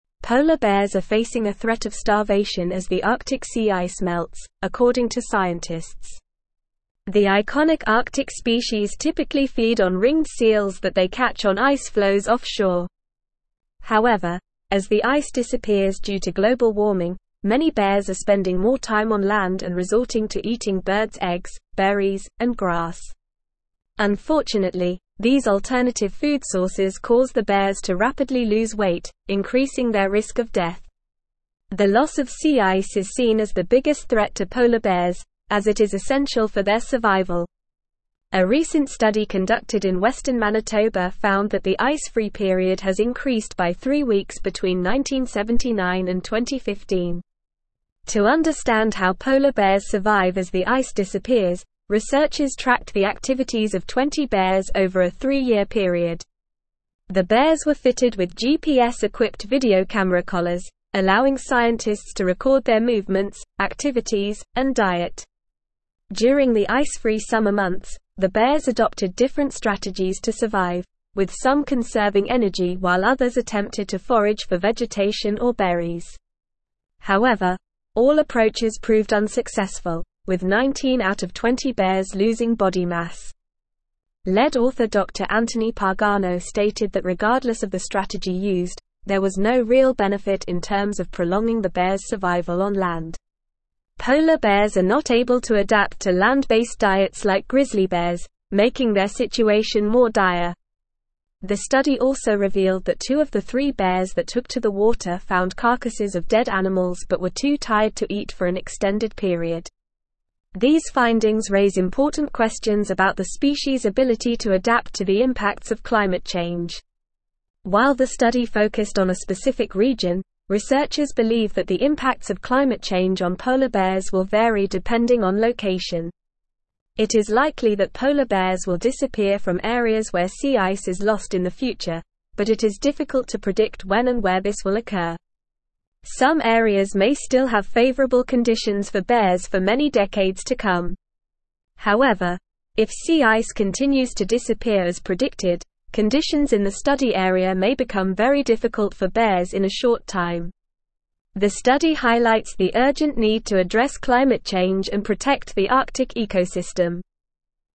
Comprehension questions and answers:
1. The iconic Arctic (1)______ typically feed on (2)______ seals that they catch on ice floes offshore.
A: species

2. The iconic Arctic (1)______ typically feed on (2)______ seals that they catch on ice floes offshore.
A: ringed

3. Unfortunately, these alternative food sources cause the bears to rapidly lose (3)______, increasing their risk of death.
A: weight

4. The loss of sea ice is seen as the biggest threat to (4)______ bears, as it is essential for their survival.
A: polar

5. A recent study conducted in Western Manitoba found that the ice-free (5)______ has (6)______ by three weeks between 1979 and 2015.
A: period

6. A recent study conducted in Western Manitoba found that the ice-free (5)______ has (6)______ by three weeks between 1979 and 2015.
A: increased

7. To understand how polar bears survive as the ice (7)______, (8)______ tracked the activities of 20 bears over a three-year period.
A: disappears

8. To understand how polar bears survive as the ice (7)______, (8)______ tracked the activities of 20 bears over a three-year period.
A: researchers

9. However, all approaches proved unsuccessful, with 19 out of 20 (9)______ losing body mass.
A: bears

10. Polar bears are not able to adapt to land-based (10)______ like grizzly bears, making their situation more dire.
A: diets

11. The study also revealed that two of the three bears that took to the water found carcasses of dead (11)______ but were too (12)______ to eat for an extended period.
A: animals

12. The study also revealed that two of the three bears that took to the water found carcasses of dead (11)______ but were too (12)______ to eat for an extended period.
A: tired

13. While the study focused on a (13)______ region, researchers believe that the impacts of climate change on polar bears will vary (14)______ on location.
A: specific

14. While the study focused on a (13)______ region, researchers believe that the impacts of climate change on polar bears will vary (14)______ on location.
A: depending

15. It is likely that polar bears will (15)______ from areas where sea ice is lost in the future, but it is (16)______ to predict when and where this will occur.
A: disappear

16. It is likely that polar bears will (15)______ from areas where sea ice is lost in the future, but it is (16)______ to predict when and where this will occur.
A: difficult

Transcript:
Polar bears are facing a threat of starvation as the Arctic sea ice melts, according to scientists. The iconic Arctic species typically feed on ringed seals that they catch on ice floes offshore. However, as the ice disappears due to global warming, many bears are spending more time on land and resorting to eating bird's eggs, berries, and grass. Unfortunately, these alternative food sources cause the bears to rapidly lose weight, increasing their risk of death. The loss of sea ice is seen as the biggest threat to polar bears, as it is essential for their survival.
A recent study conducted in Western Manitoba found that the ice-free period has increased by three weeks between 1979 and 2015. To understand how polar bears survive as the ice disappears, researchers tracked the activities of 20 bears over a three-year period. The bears were fitted with GPS-equipped video camera collars, allowing scientists to record their movements, activities, and diet. During the ice-free summer months, the bears adopted different strategies to survive, with some conserving energy while others attempted to forage for vegetation or berries. However, all approaches proved unsuccessful, with 19 out of 20 bears losing body mass.
Lead author Dr. Anthony Pagano stated that regardless of the strategy used, there was no real benefit in terms of prolonging the bears' survival on land. Polar bears are not able to adapt to land-based diets like grizzly bears, making their situation more dire. The study also revealed that two of the three bears that took to the water found carcasses of dead animals but were too tired to eat for an extended period. These findings raise important questions about the species' ability to adapt to the impacts of climate change.
While the study focused on a specific region, researchers believe that the impacts of climate change on polar bears will vary depending on location. It is likely that polar bears will disappear from areas where sea ice is lost in the future, but it is difficult to predict when and where this will occur. Some areas may still have favorable conditions for bears for many decades to come. However, if sea ice continues to disappear as predicted, conditions in the study area may become very difficult for bears in a short time. The study highlights the urgent need to address climate change and protect the Arctic ecosystem.

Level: Level 4